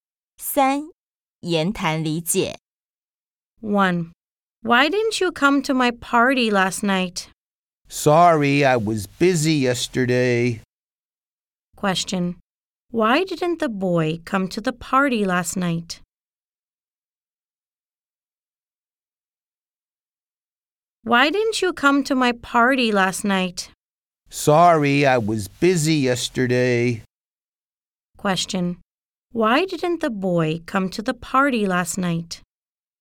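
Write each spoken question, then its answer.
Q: Why didn't the boy come to the party last night?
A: He was busy yesterday.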